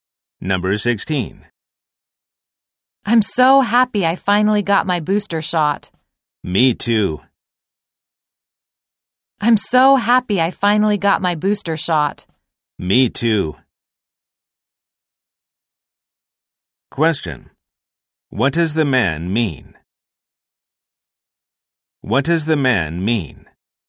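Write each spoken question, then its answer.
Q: What does the man mean?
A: He also got his booster shot.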